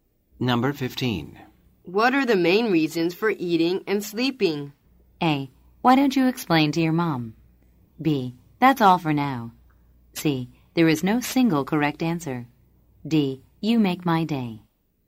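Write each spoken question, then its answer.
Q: What are the main reasons for eating and sleeping?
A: C: There is no single correct answer.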